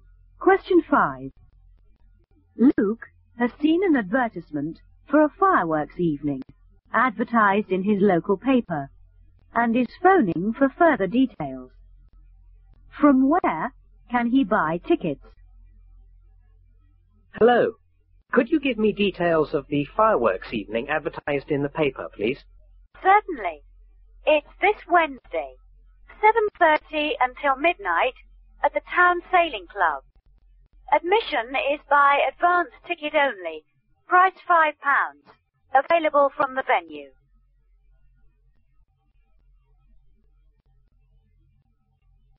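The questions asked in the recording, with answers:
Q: From where can he buy tickets?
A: From the venue, the Town Sailing Club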